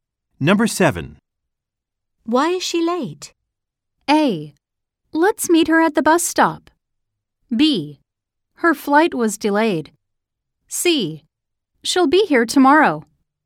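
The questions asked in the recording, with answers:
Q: Why is she late?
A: B: Her flight was delayed.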